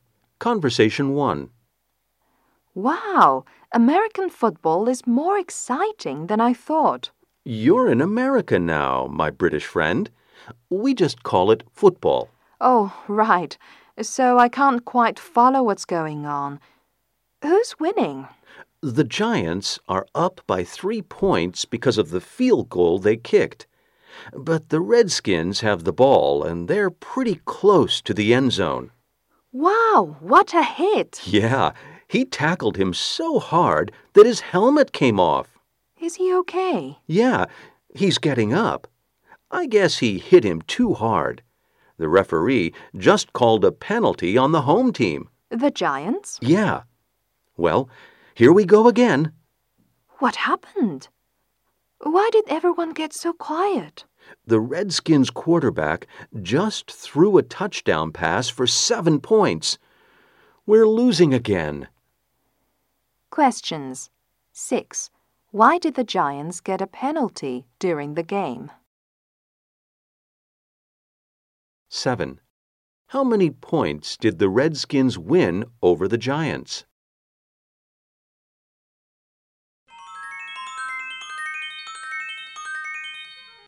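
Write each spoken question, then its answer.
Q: Why did the Giants get a penalty during the game?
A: A player tackled too hard.

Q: How many points did the Redskins win over the Giants?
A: 4 points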